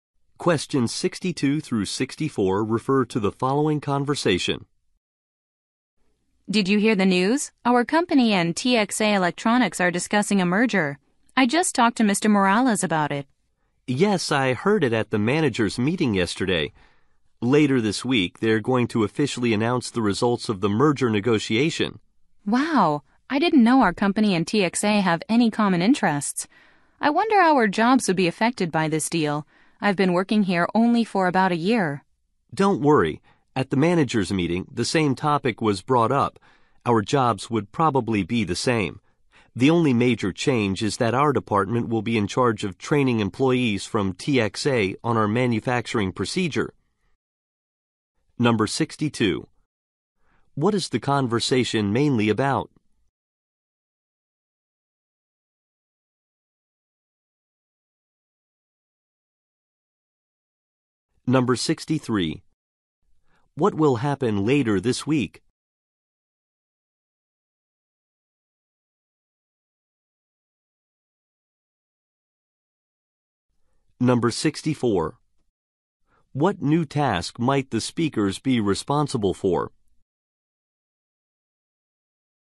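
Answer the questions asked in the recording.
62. A company merger
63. The merger negotiation results will be announced
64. Training TXA employees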